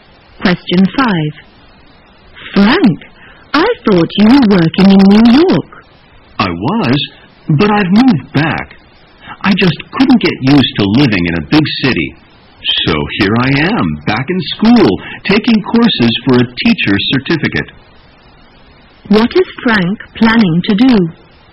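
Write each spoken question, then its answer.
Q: What is Frank planning to do?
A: Become a teacher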